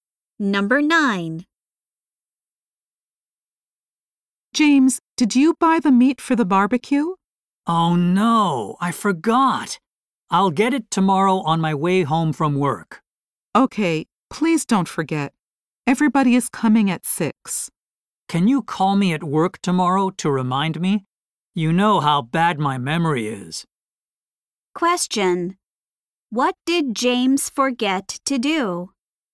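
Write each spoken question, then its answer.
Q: What did James forget to do?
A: Buy the meat for the barbecue.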